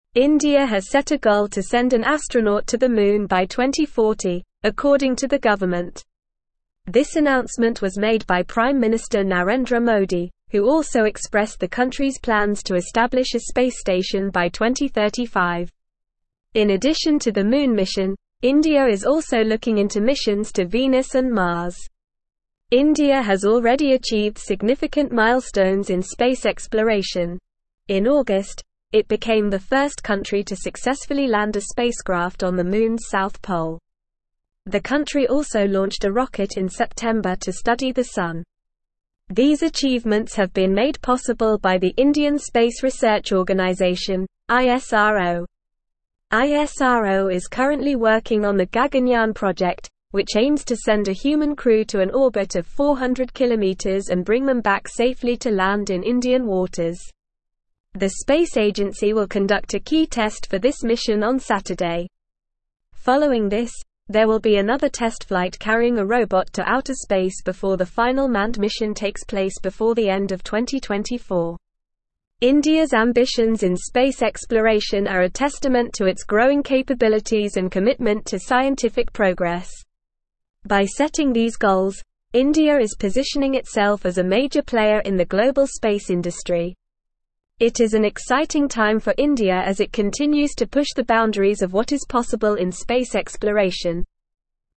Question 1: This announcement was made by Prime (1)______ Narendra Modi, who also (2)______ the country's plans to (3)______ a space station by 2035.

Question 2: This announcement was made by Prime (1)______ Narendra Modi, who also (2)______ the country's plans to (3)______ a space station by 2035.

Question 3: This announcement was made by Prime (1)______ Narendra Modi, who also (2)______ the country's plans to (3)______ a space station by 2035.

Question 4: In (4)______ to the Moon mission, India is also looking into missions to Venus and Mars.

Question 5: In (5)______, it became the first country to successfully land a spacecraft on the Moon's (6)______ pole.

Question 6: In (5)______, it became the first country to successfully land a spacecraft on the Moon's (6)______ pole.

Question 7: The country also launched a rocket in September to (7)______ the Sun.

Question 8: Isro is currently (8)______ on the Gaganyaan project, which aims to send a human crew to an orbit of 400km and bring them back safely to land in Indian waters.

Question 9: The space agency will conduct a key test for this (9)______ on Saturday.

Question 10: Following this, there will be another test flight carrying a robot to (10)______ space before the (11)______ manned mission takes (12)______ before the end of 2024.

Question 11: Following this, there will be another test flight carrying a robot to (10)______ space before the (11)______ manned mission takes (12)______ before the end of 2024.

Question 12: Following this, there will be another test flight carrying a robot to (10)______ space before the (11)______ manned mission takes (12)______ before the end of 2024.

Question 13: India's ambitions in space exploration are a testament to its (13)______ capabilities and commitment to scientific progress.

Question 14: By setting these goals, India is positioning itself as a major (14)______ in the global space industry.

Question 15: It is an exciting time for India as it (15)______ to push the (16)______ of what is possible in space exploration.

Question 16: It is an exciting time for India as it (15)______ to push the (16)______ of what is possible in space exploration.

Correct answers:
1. Minister
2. expressed
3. establish
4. addition
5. August
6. south
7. study
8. working
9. mission
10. outer
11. final
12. place
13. growing
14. player
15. continues
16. boundaries

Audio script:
India has set a goal to send an astronaut to the Moon by 2040, according to the government. This announcement was made by Prime Minister Narendra Modi, who also expressed the country's plans to establish a space station by 2035. In addition to the Moon mission, India is also looking into missions to Venus and Mars.
India has already achieved significant milestones in space exploration. In August, it became the first country to successfully land a spacecraft on the Moon's south pole. The country also launched a rocket in September to study the Sun. These achievements have been made possible by the Indian Space Research Organisation (Isro).
Isro is currently working on the Gaganyaan project, which aims to send a human crew to an orbit of 400km and bring them back safely to land in Indian waters. The space agency will conduct a key test for this mission on Saturday. Following this, there will be another test flight carrying a robot to outer space before the final manned mission takes place before the end of 2024.
India's ambitions in space exploration are a testament to its growing capabilities and commitment to scientific progress. By setting these goals, India is positioning itself as a major player in the global space industry. It is an exciting time for India as it continues to push the boundaries of what is possible in space exploration.

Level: Level 4